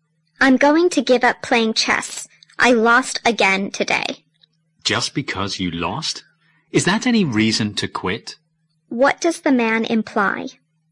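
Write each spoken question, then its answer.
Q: What does the man imply?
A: Losing once is no reason to give up chess.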